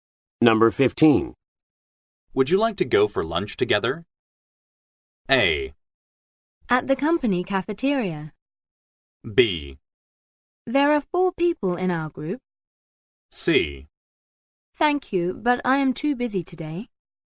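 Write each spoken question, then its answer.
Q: Would you like to go for lunch together?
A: C: Thank you, but I am too busy today.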